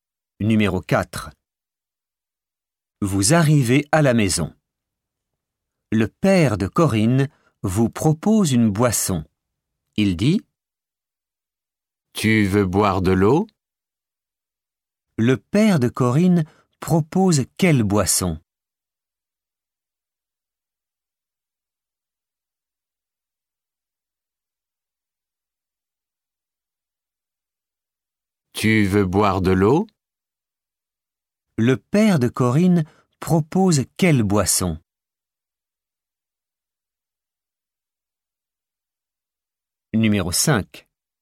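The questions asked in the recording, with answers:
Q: Le père de Corinne propose quelle boisson ?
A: De l'eau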